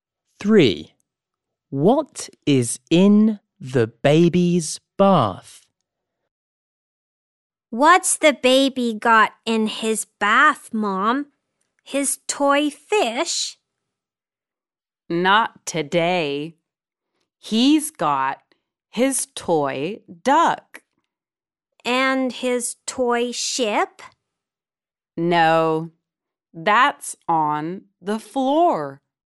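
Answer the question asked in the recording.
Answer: His toy duck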